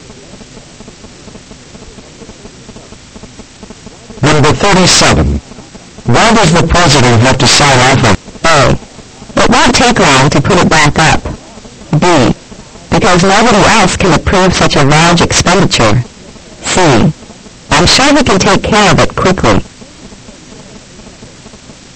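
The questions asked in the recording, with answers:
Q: Why does the president have to sign off on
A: B: Because nobody else can approve such a large expenditure.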